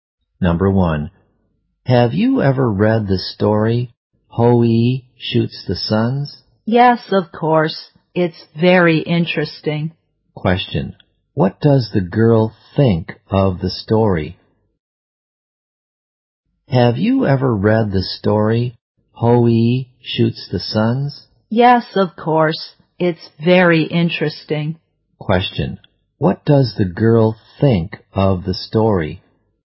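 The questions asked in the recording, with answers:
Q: what does the girl think of the story?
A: It's very interesting.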